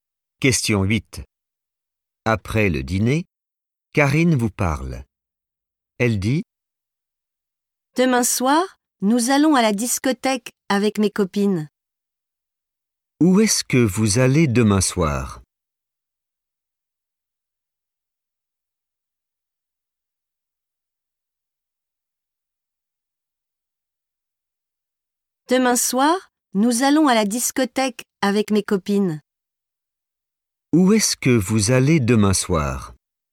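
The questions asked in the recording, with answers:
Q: Où est-ce que vous allez demain soir?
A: à la discothèque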